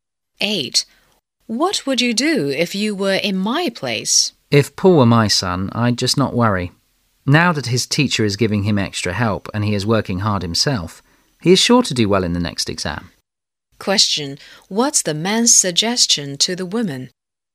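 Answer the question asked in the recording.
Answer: Not to worry about Paul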